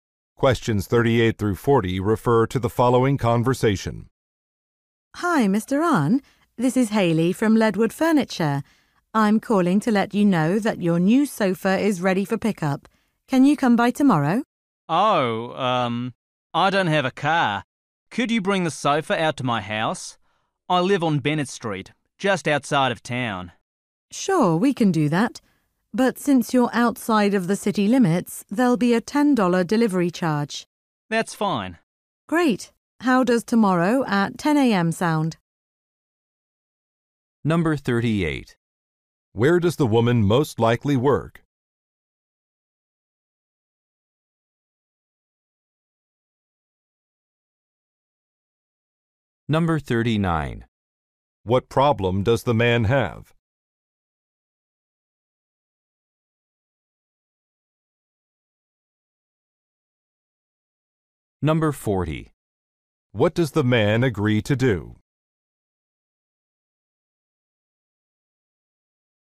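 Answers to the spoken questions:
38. At a furniture store
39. He doesn't have a car
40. Pay a $10 delivery charge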